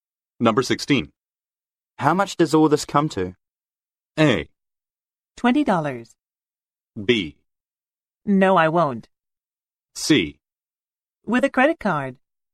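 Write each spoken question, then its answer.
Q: How much does all this come to?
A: A: $20.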